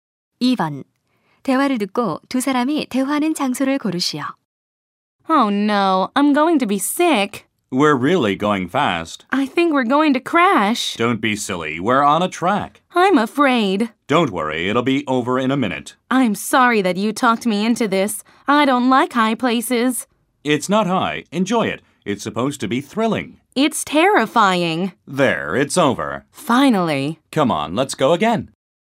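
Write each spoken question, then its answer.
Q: 대화를 듣고 두 사람이 대화하는 장소를 고르시오.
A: 놀이공원 롤러코스터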